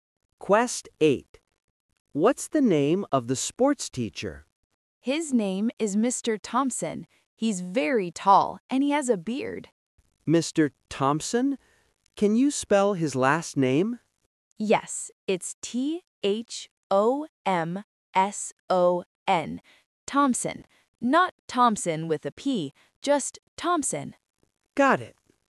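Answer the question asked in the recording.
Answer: Mr. Thomson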